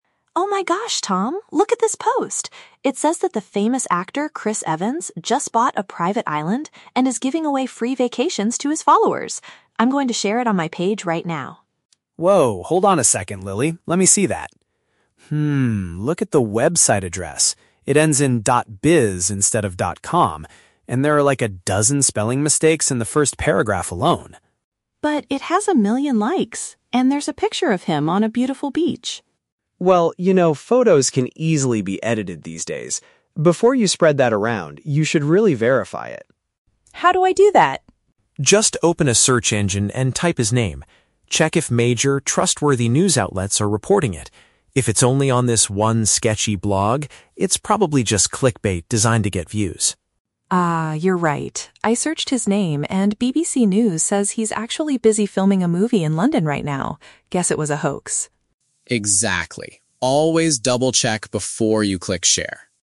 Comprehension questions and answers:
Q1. What makes Tom doubt the story about the actor?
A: The article contains several written errors.

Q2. What method does the brother suggest for checking the truth?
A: Looking for the story on respected media organizations.

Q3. What is the actor actually doing according to a reliable source?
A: He is currently shooting a film in a European city.

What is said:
Lily: Oh my gosh, Tom! Look at this post. It says that the famous actor, Chris Evans, just bought a private island and is giving away free vacations to his followers! I'm going to share it on my page right now.
Tom: Whoa, hold on a second, Lily. Let me see that. look at the website address. It ends in ".biz" instead of ".com", and there are, like, a dozen spelling mistakes in the first paragraph alone.
Lily: But it has a million likes! And there's a picture of him on a beautiful beach.
Tom: Well, you know photos can easily be edited these days. Before you spread that around, you should really verify it.
Lily: How do I do that?
Tom: Just open a search engine and type his name. Check if major, trustworthy news outlets are reporting it. If it's only on this one sketchy blog, it's probably just clickbait designed to get views.
Lily: Ah, you're right. I searched his name and BBC News says he's actually busy filming a movie in London right now. Guess it was a hoax.